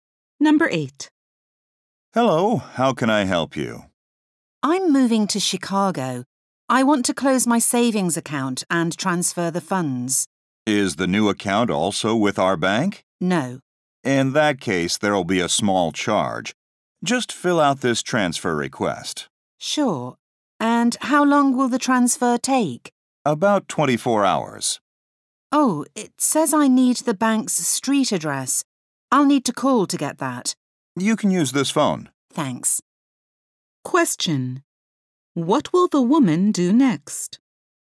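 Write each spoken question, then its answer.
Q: What will the woman do next?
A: Call to get the bank's street address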